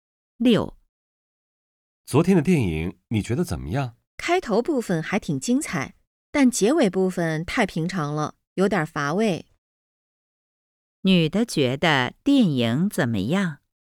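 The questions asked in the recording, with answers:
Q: 女的觉得电影怎么样?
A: 开头挺精彩,结尾太平常,有点乏味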